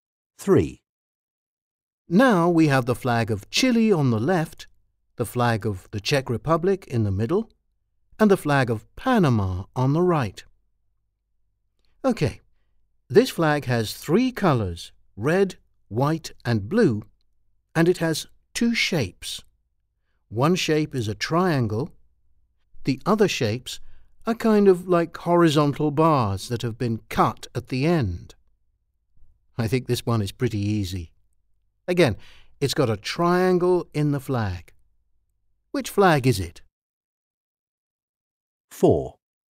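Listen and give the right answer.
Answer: B: the flag of the Czech Republic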